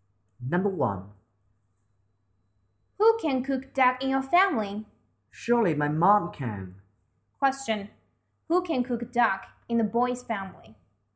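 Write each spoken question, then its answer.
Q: Who can cook duck in the boy's family?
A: His mom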